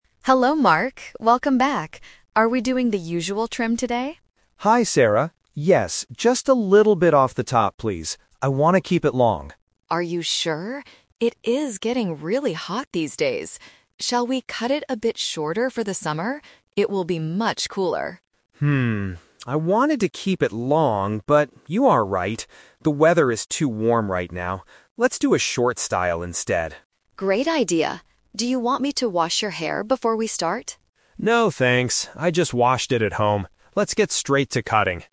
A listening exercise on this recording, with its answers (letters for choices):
Listen to the conversation and choose the correct answer (A, B, or C).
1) What kind of hairstyle did the man want at the beginning?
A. A very short style.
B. To keep his hair long.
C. A completely new color.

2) Why does the hairdresser suggest a shorter cut?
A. Because it is hot summer weather.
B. Because short hair is cheaper to cut.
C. Because his hair is badly damaged.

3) What is the hairdresser going to do first?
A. Wash the man's hair.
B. Dry the man's hair.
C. Cut the man's hair.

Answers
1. B
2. A
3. C

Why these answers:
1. The customer says at the beginning, "I want to keep it long." Option A is the Trap because a short style is what he decides to get at the end of the conversation. Option C is a plausible salon request but is never mentioned.
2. The hairdresser says, "It is getting really hot these days. Shall we cut it a bit shorter for the summer?" Option B and Option C are logical reasons for a haircut, but they are not mentioned in the audio.
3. This is the second Twist. The hairdresser asks to wash his hair, but he says "No, thanks" and "Let's get straight to cutting." Option A is the Trap (it was suggested but rejected). Option B is not mentioned.

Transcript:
Hairdresser: Hello, Mark. Welcome back! Are we doing the usual trim today?
Customer: Hi, Sarah. Yes, just a little bit off the top, please. I want to keep it long.
Hairdresser: Are you sure? It is getting really hot these days. Shall we cut it a bit shorter for the summer? It will be much cooler.
I wanted to keep it long, but you are right. The weather is too warm right now. Let's do a short style instead.
Hairdresser: Great idea! Do you want me to wash your hair before we start?